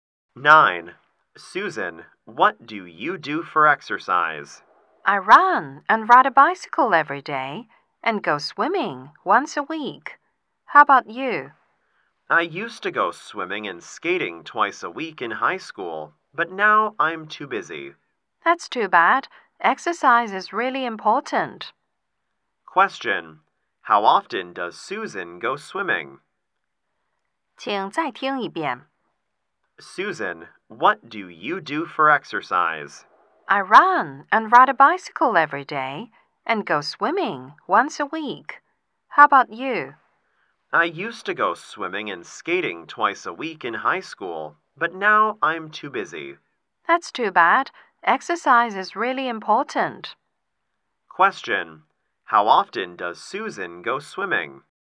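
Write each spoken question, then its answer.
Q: How often does Susan go swimming?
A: Once a week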